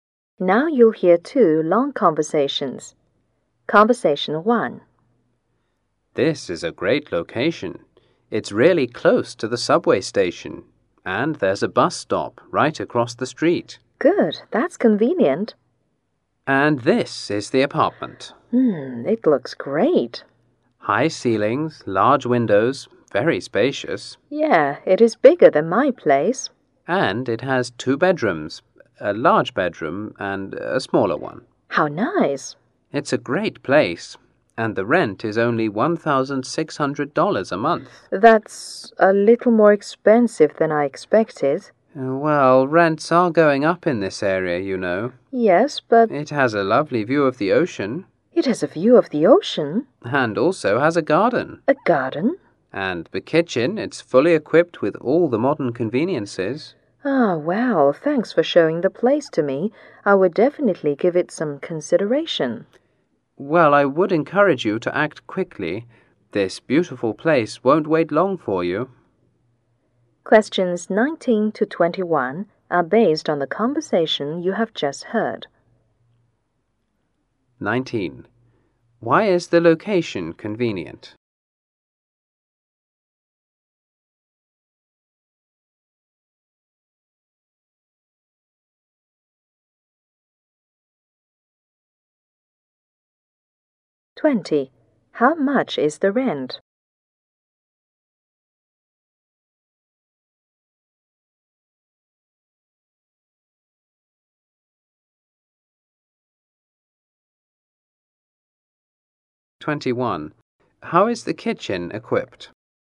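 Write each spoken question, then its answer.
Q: Why is the location convenient?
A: It is close to the subway station and a bus stop

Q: How much is the rent?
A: $1,600 a month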